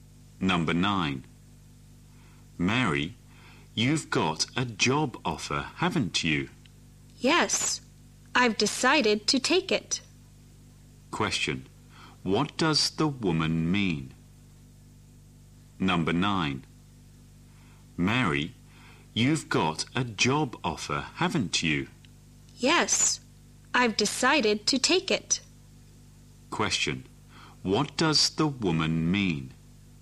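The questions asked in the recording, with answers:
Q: What does the woman mean?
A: She has decided to accept the job offer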